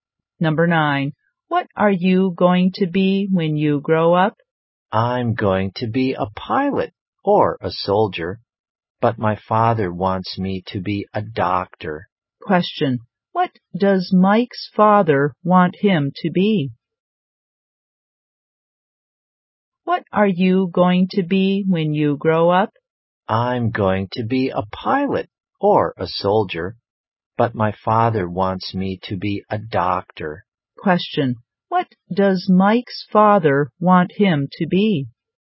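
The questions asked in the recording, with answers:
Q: What does Mike's father want him to be?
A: A doctor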